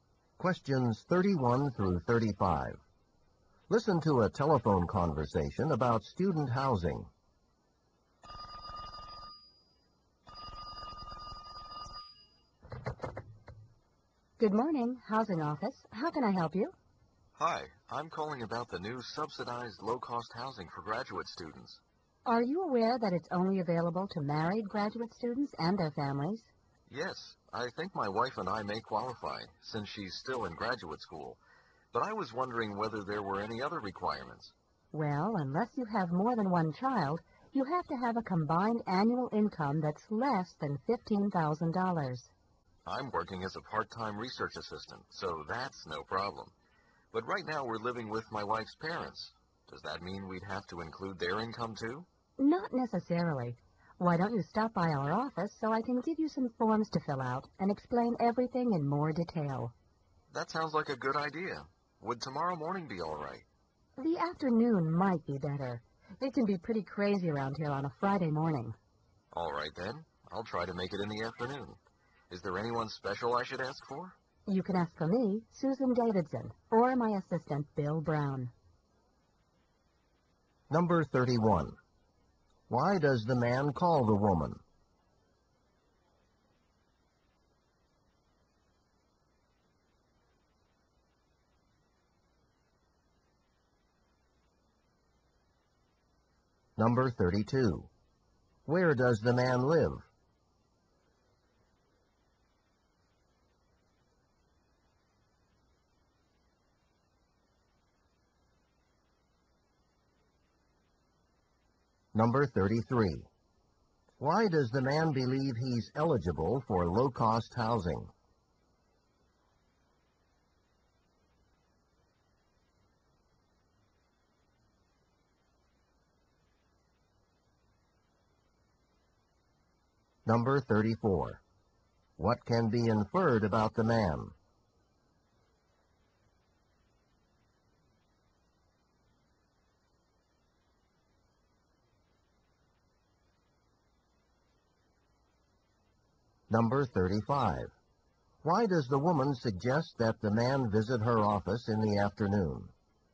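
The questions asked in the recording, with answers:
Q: Why does the man call the woman?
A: To ask about low-cost housing for graduate students

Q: Where does the man live?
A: With his wife's parents

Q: Why does the man believe he's eligible for low-cost housing?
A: He is married to a graduate student and has a low income

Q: Why does the woman suggest that the man visit her office in the afternoon?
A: The office is very busy on Friday mornings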